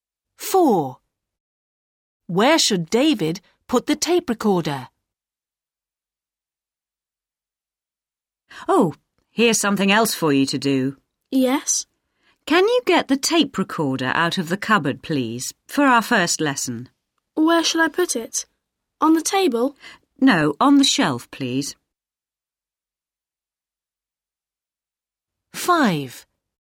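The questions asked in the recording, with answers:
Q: Where should David put the tape recorder?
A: on the shelf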